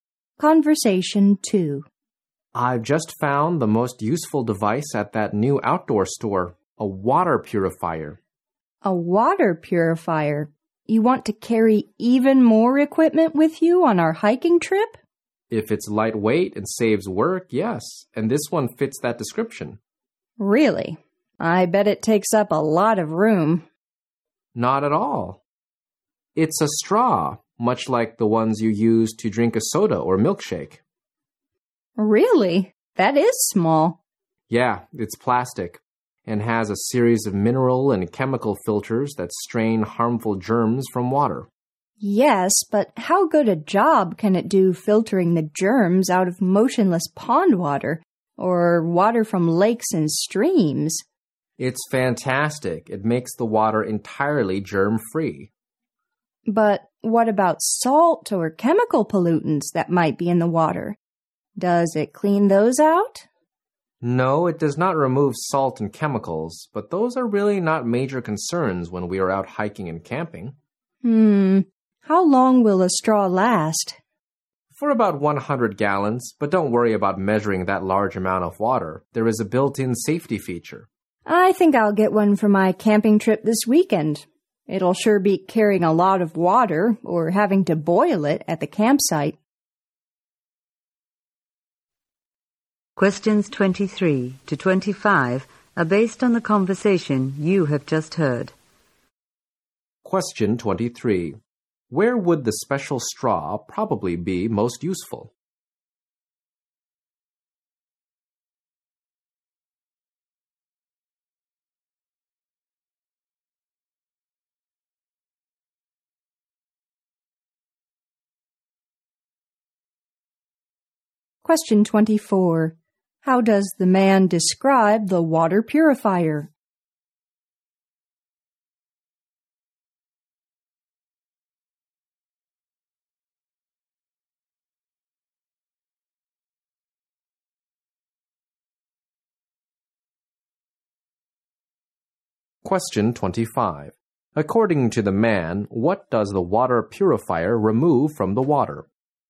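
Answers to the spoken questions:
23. On hiking or camping trips
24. It is small and lightweight, like a plastic drinking straw.
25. Harmful germs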